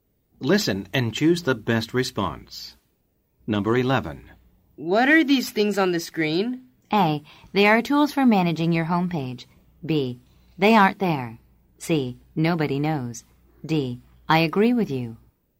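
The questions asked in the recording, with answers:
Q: What are these things on the screen?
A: A: They are tools for managing your homepage.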